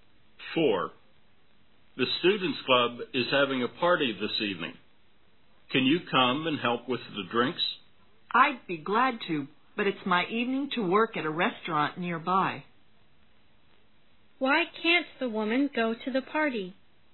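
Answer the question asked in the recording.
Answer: She has to work at a restaurant nearby that evening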